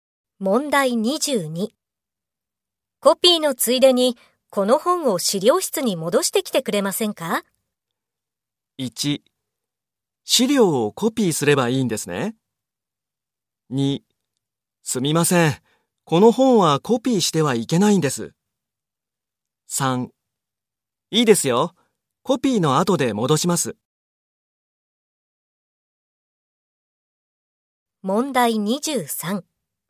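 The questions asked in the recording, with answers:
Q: コピーのついでに、この本を資料室に戻してきてくれませんか?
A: 3: いいですよ。コピーの後で戻します。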